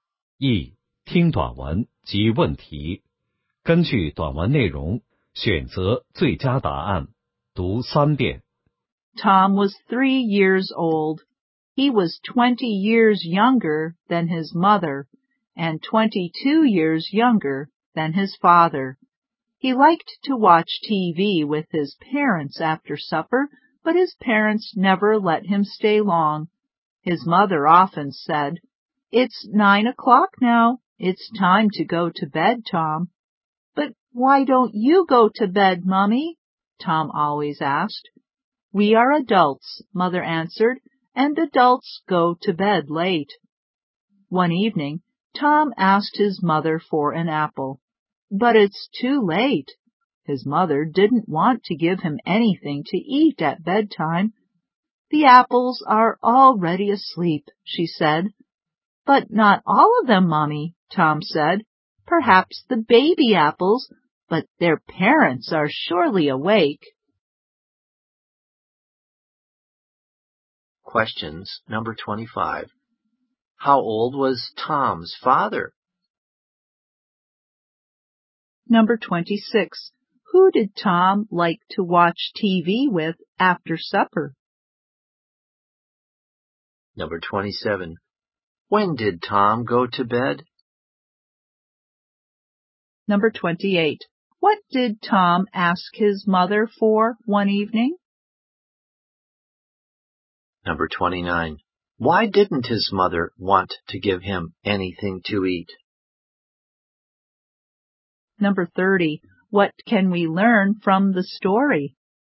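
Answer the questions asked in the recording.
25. 25 years old
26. His parents
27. At 9 o'clock
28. An apple
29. Because it was too late, at bedtime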